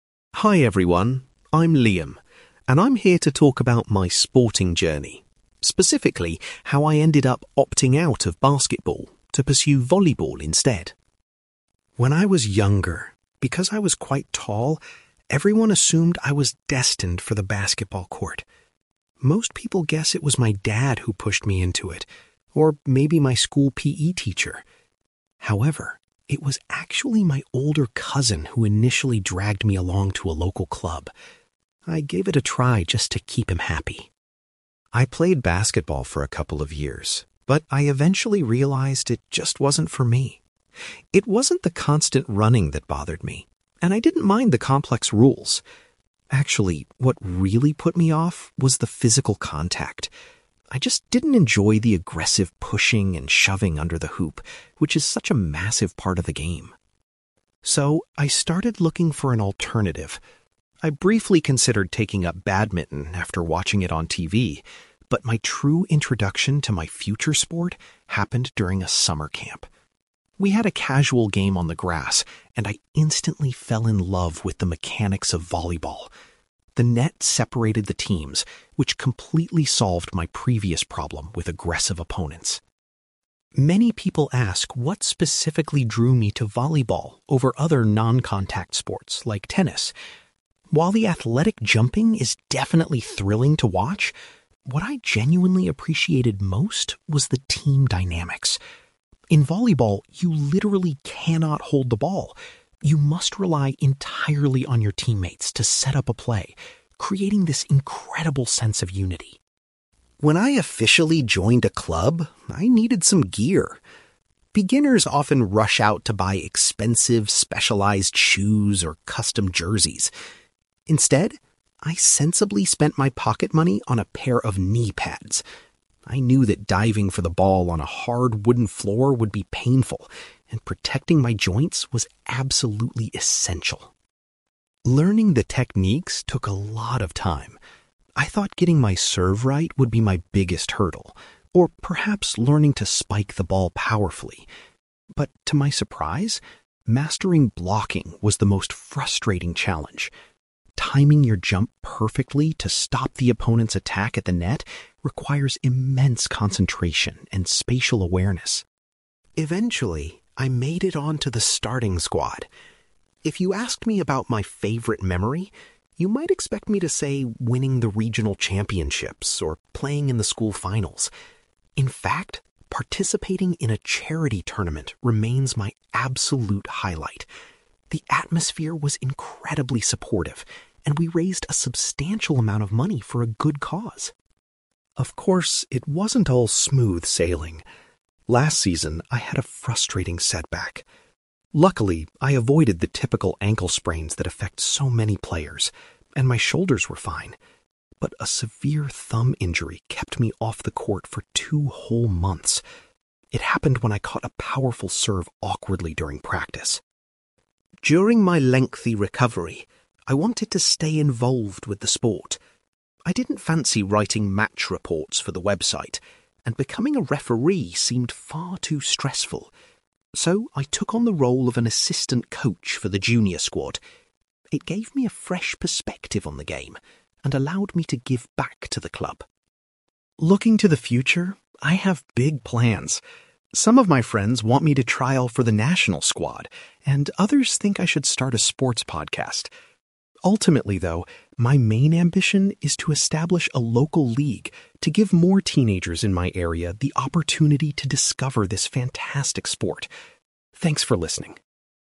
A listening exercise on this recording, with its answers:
You will hear a young man called Liam giving a presentation about his decision to change sports. For questions 9-18, complete the sentences with a word or short phrase.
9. Liam mentions that his (9)........................... was the person who originally took him to play basketball.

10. Liam decided to stop playing basketball because he strongly disliked the (10)........................... involved in the sport.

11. Liam first discovered his passion for playing volleyball while attending a (11)........................... .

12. According to Liam, the most appealing aspect of volleyball is the (12)........................... required to succeed.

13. The first piece of volleyball equipment Liam decided to purchase was some (13)........................... .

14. Liam found that learning the skill of (14)........................... was the hardest part of his training.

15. Liam considers playing in a (15)........................... to be his best memory in the sport so far.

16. Liam was unable to play for a couple of months due to a bad (16)........................... .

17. While recovering, Liam stayed connected to the club by volunteering as an (17)........................... .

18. Liam's long-term goal is to set up a (18)........................... so more young people can play volleyball.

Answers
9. older cousin
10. physical contact
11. summer camp
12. team dynamics
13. knee pads
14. blocking
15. charity tournament
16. thumb injury
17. assistant coach
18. local league

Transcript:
Liam: Hi everyone. I'm Liam, and I'm here to talk about my sporting journey, specifically how I ended up opting out of basketball to pursue volleyball instead.
When I was younger, because I was quite tall, everyone assumed I was destined for the basketball court. Most people guess it was my dad who pushed me into it, or maybe my school PE teacher. However, it was actually my older cousin who initially dragged me along to a local club. I gave it a try just to keep him happy.
I played basketball for a couple of years, but I eventually realised it just wasn't for me. It wasn't the constant running that bothered me, and I didn't mind the complex rules. Actually, what really put me off was the physical contact. I just didn't enjoy the aggressive pushing and shoving under the hoop, which is such a massive part of the game.
So, I started looking for an alternative. I briefly considered taking up badminton after watching it on TV, but my true introduction to my future sport happened during a summer camp. We had a casual game on the grass, and I instantly fell in love with the mechanics of volleyball. The net separated the teams, which completely solved my previous problem with aggressive opponents.
Many people ask what specifically drew me to volleyball over other non-contact sports like tennis. While the athletic jumping is definitely thrilling to watch, what I genuinely appreciated most was the team dynamics. In volleyball, you literally cannot hold the ball; you must rely entirely on your teammates to set up a play, creating this incredible sense of unity.
When I officially joined a club, I needed some gear. Beginners often rush out to buy expensive specialized shoes or custom jerseys. Instead, I sensibly spent my pocket money on a pair of knee pads. I knew that diving for the ball on a hard wooden floor would be painful, and protecting my joints was absolutely essential.
Learning the techniques took a lot of time. I thought getting my serve right would be my biggest hurdle, or perhaps learning to spike the ball powerfully. But to my surprise, mastering blocking was the most frustrating challenge. Timing your jump perfectly to stop the opponent's attack at the net requires immense concentration and spatial awareness.
Eventually, I made it onto the starting squad. If you asked me about my favorite memory, you might expect me to say winning the regional championships or playing in the school finals. In fact, participating in a charity tournament remains my absolute highlight. The atmosphere was incredibly supportive, and we raised a substantial amount of money for a good cause.
Of course, it wasn't all smooth sailing. Last season, I had a frustrating setback. Luckily, I avoided the typical ankle sprains that affect so many players, and my shoulders were fine. But a severe thumb injury kept me off the court for two whole months. It happened when I caught a powerful serve awkwardly during practice.
During my lengthy recovery, I wanted to stay involved with the sport. I didn't fancy writing match reports for the website, and becoming a referee seemed far too stressful. So, I took on the role of an assistant coach for the junior squad. It gave me a fresh perspective on the game and allowed me to give back to the club.
Looking to the future, I have big plans. Some of my friends want me to trial for the national squad, and others think I should start a sports podcast. Ultimately, though, my main ambition is to establish a local league to give more teenagers in my area the opportunity to discover this fantastic sport. Thanks for listening!

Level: B2